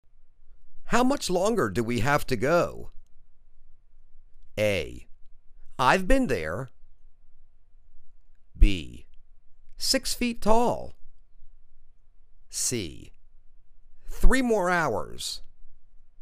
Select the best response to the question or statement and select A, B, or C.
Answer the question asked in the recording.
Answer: Three more hours